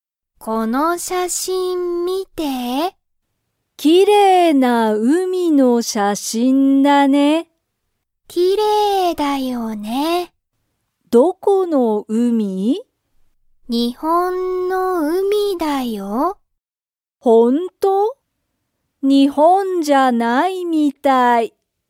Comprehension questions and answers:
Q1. その海(うみ)の写真(しゃしん)は____。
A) 日本(にほん)じゃない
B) きれいだ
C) 写真(しゃしん)じゃない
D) 新(あたら)しい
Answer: きれいだ

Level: Level 1

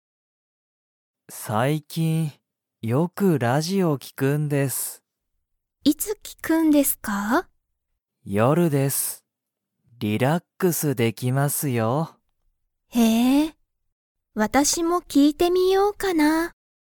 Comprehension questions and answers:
小島こじまさんは、最近さいきん____ラジオを聞きく。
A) 夜よる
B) 一緒いっしょに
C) 今日きょう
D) もう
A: 夜よる

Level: Level 1

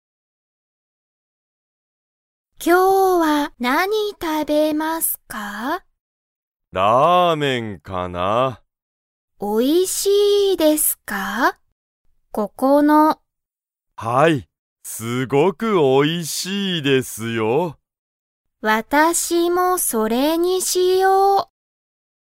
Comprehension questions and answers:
ここのラーメンは____。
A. とても高(たか)い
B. あまり安(やす)くない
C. すごくおいしい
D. 結構新(けっこうあたら)しい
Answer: すごくおいしい

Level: Level 1

